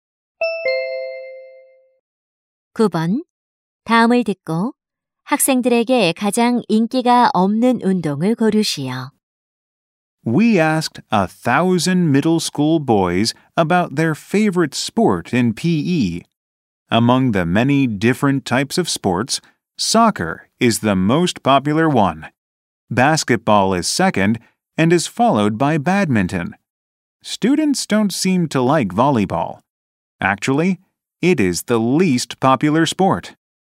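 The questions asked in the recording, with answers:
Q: 다음을 듣고 학생들에게 가장 인기가 없는 운동을 고르시오.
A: 배구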